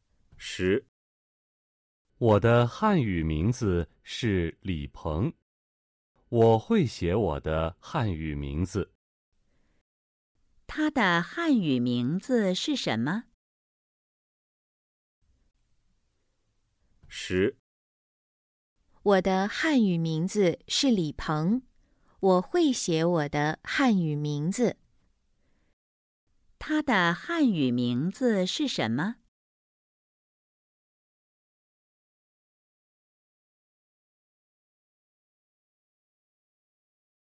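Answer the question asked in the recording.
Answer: 李鹏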